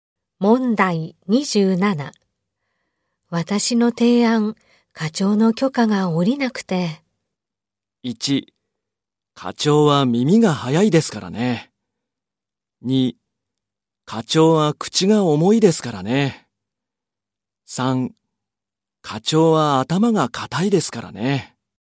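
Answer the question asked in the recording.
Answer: 3: 課長は頭が固いですからね。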